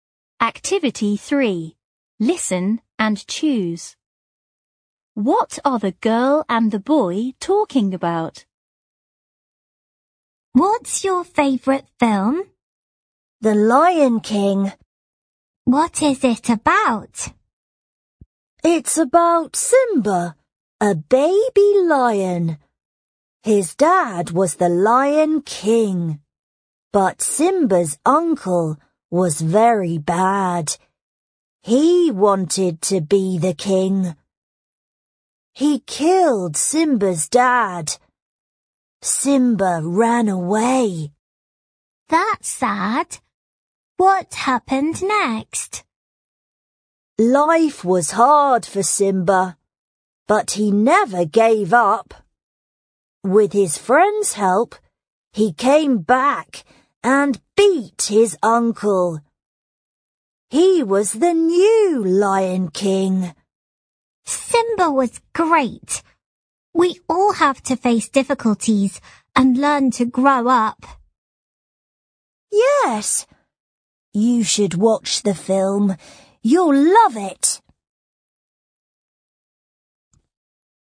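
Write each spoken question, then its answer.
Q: What are the girl and the boy talking about?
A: A film, The Lion King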